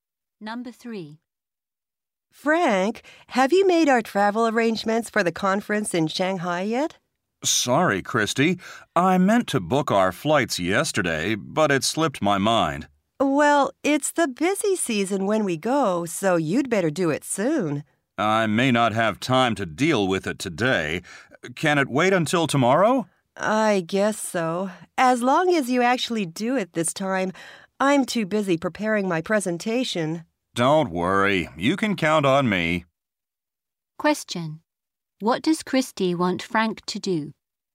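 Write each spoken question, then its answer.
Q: What does Christy want Frank to do?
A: Book their flights for the conference soon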